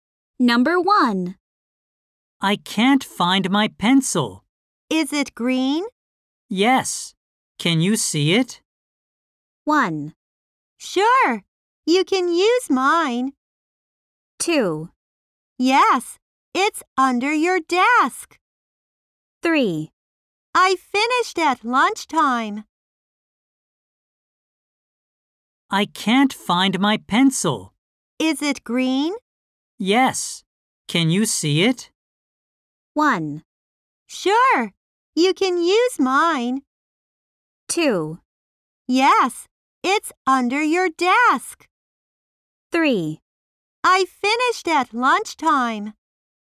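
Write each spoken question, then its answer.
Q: Yes. Can you see it?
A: 2: Yes. It's under your desk.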